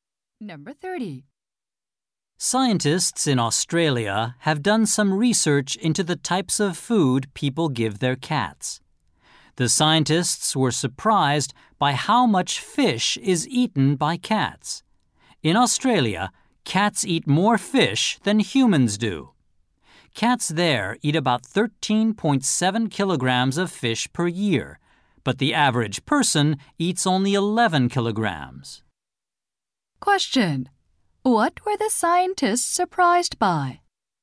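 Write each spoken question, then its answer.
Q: Question: what were the scientists surprised by?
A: How much fish cats eat.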